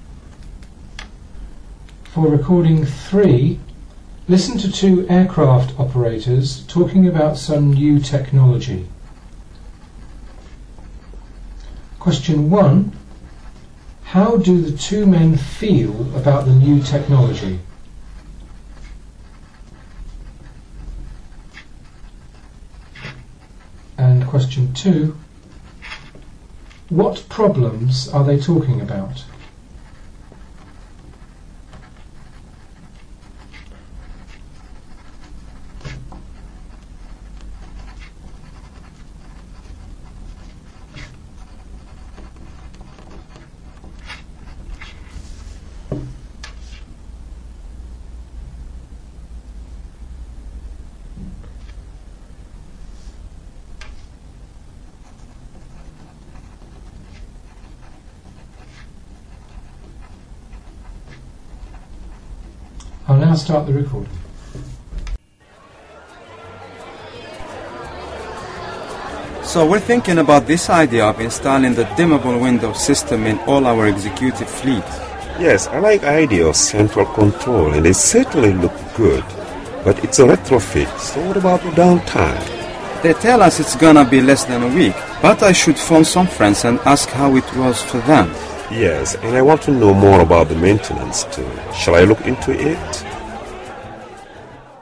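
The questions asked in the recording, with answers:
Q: What problems are they talking about?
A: Downtime for the retrofit and maintenance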